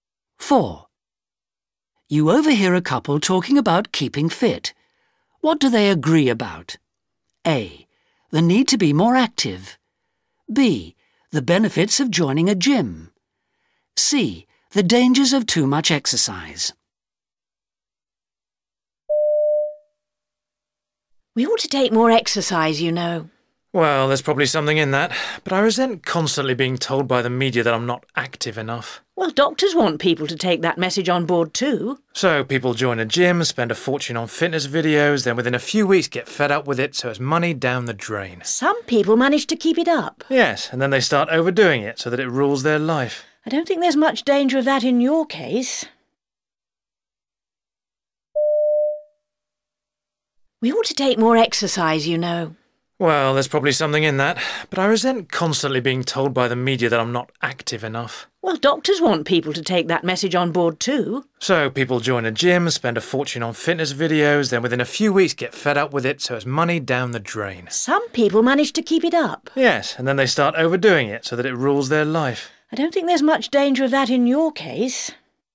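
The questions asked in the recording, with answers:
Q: What do they agree about?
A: A: The need to be more active.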